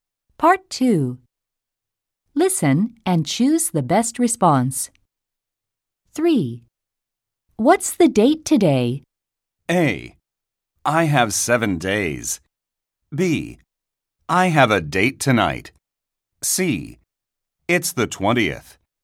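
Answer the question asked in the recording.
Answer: C: It's the 20th.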